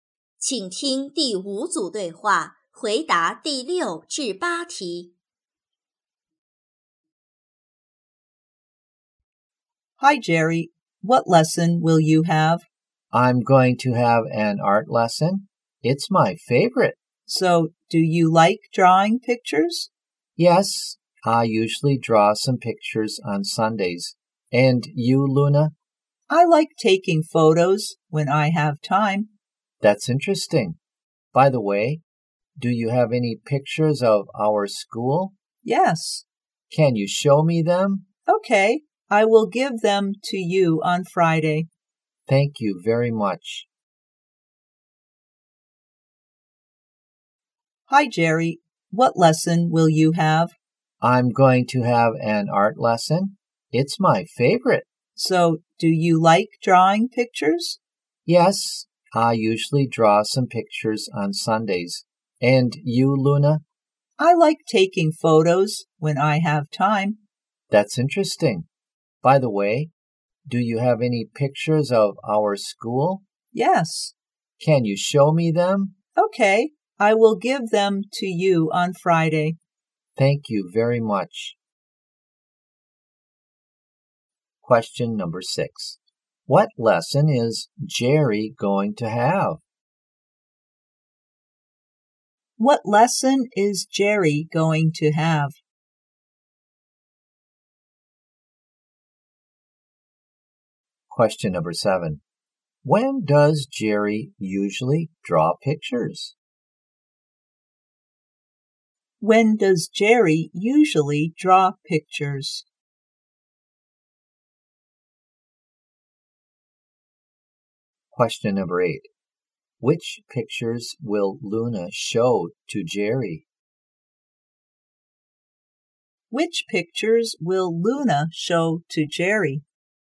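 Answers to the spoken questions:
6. An art lesson
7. On Sundays
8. Pictures of their school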